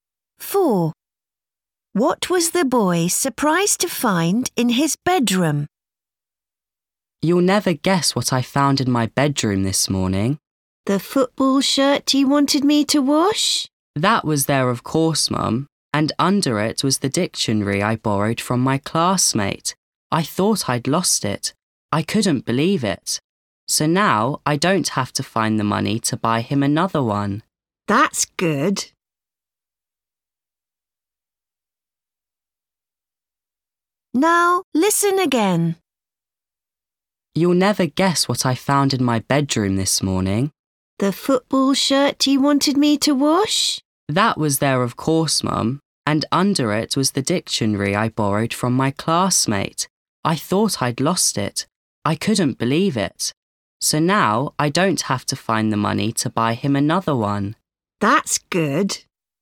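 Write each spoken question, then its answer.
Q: What was the boy surprised to find in his bedroom?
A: The dictionary he borrowed from his classmate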